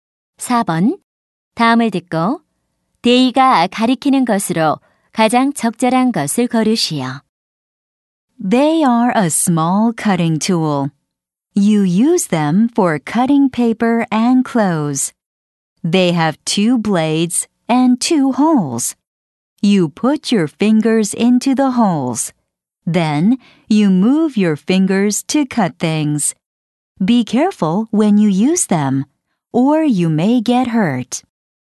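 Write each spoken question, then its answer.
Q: 다음을 듣고 데이가 가리키는 것으로 가장 적절한 것을 고르시오.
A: 가위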